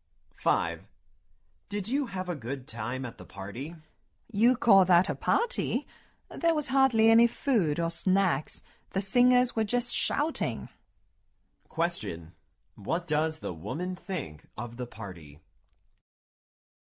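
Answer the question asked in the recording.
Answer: It was disappointing: there was hardly any food and the singers just shouted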